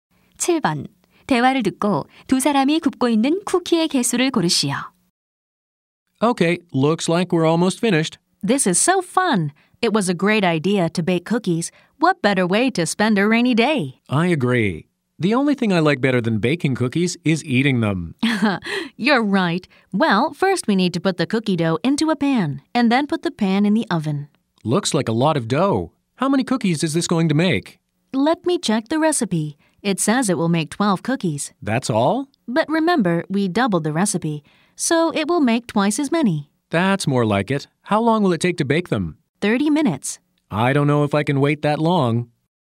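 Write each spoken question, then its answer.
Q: 대화를 듣고 두 사람이 굽고 있는 쿠키의 개수를 고르시오.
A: 24개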